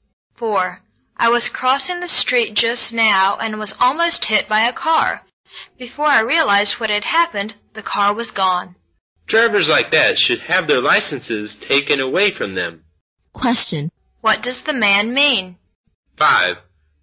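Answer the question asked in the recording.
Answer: Careless drivers like that should lose their licenses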